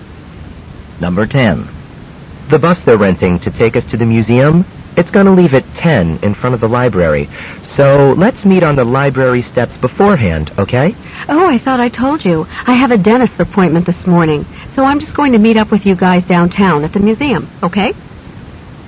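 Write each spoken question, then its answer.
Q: What does the woman imply?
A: She won't take the bus; she'll meet them at the museum.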